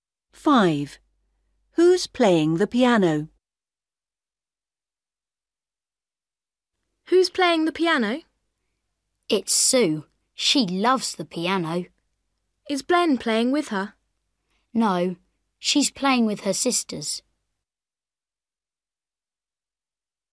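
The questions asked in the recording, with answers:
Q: Who's playing the piano?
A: Sue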